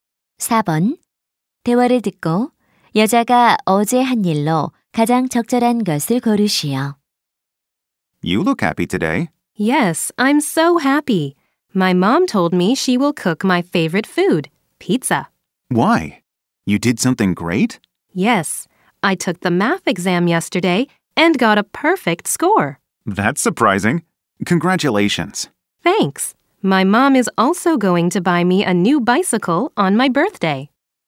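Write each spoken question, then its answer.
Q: 대화를 듣고 여자가 어제 한 일로 가장 적절한 것을 고르시오.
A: 수학 시험을 봤다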